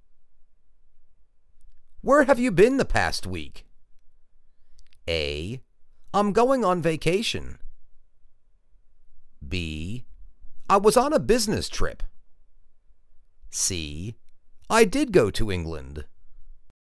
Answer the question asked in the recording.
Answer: I was on business trip.